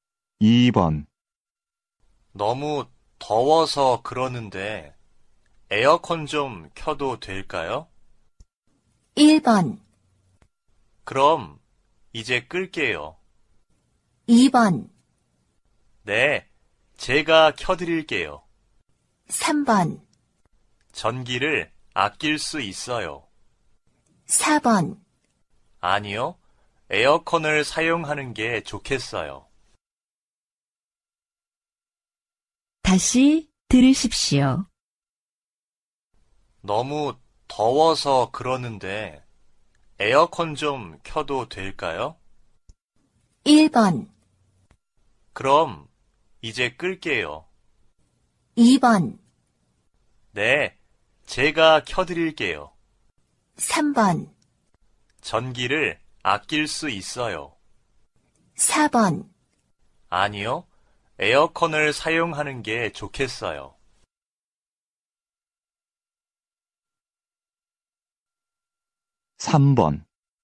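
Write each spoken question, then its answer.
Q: 너무 더워서 그러는데 에어컨 좀 켜도 될까요?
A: 2: 네, 제가 켜드릴게요.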